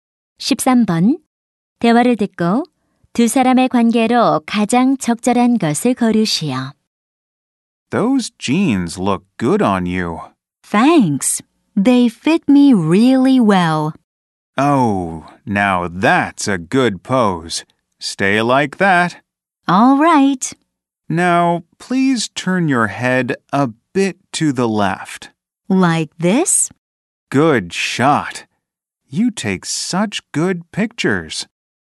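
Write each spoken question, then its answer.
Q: 대화를 듣고 두 사람의 관계로 가장 적절한 것을 고르시오.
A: 사진작가 - 모델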